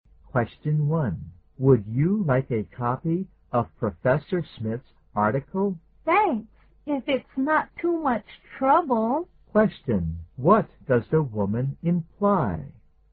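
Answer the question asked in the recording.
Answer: She would like a copy of Professor Smith's article.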